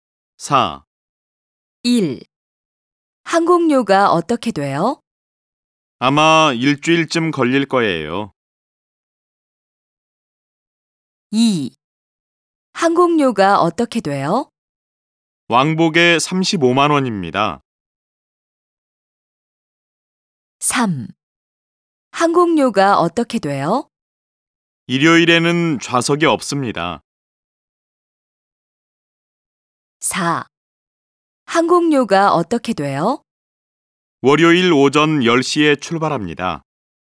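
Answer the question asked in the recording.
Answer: 2: 왕복에 35만 원입니다.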